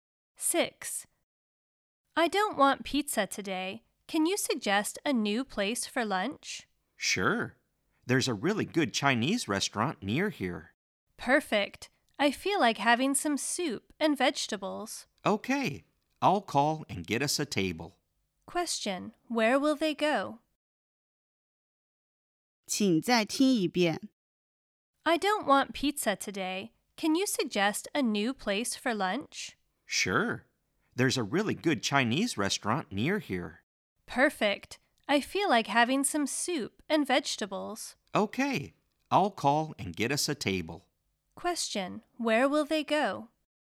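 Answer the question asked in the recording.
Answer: A Chinese restaurant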